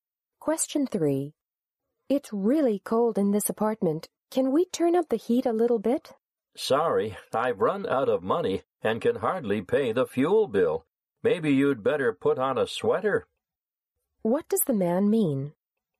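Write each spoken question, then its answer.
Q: What does the man mean?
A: He can't afford to turn up the heat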